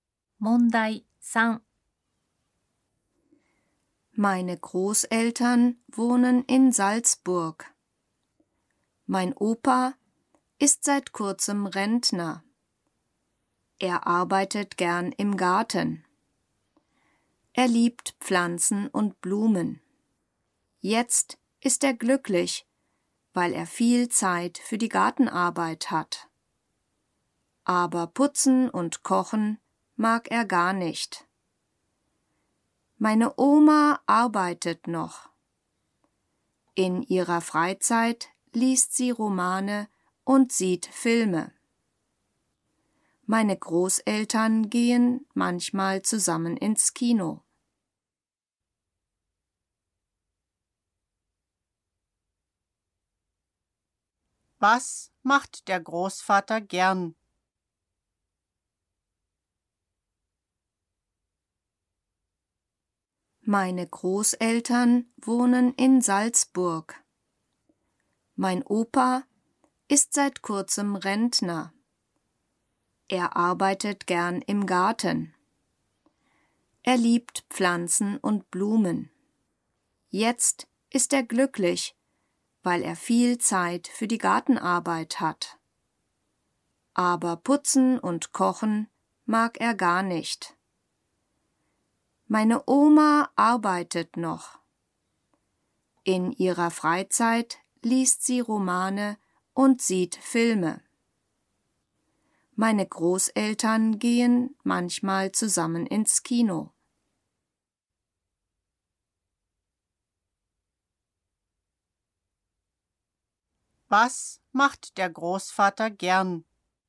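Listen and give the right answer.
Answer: Gartenarbeit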